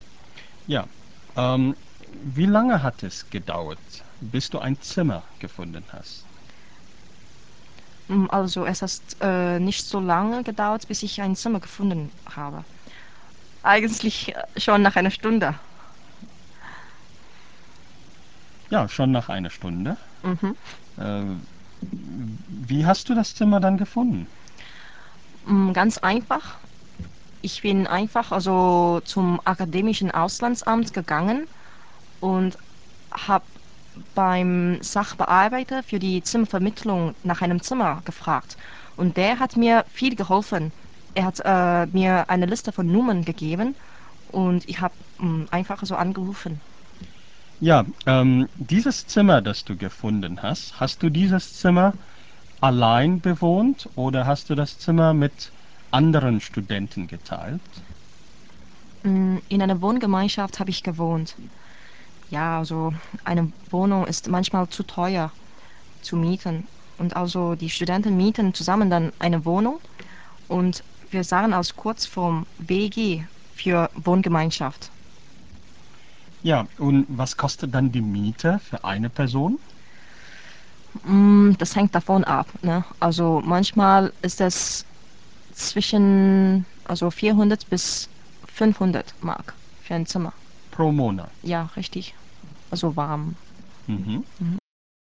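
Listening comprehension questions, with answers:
Sie hören ein Interview mit einer singapurischen Studentin in 3 Abschnitten. Hören Sie jeden Abschnitt und clicken Sie dann rechts die richtige Antwort an. Im Hörtext finden Sie viele Verben im Perfekt oder Präteritum.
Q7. Sie mußte einen Monat suchen, bis sie ein Zimmer gefunden hat.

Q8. Sie hat ihr Zimmer durch das Akademische Auslandsamt gefunden.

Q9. Sie hat nicht in einer Wohngemeinschaft, sondern allein gewohnt.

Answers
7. Falsch
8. Richtig
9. Falsch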